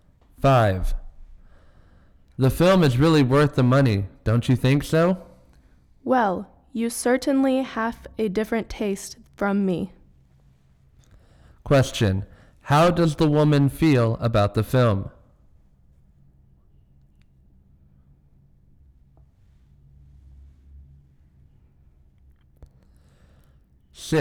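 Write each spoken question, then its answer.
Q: How does the woman feel about the film?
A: She doesn't think it is worth the money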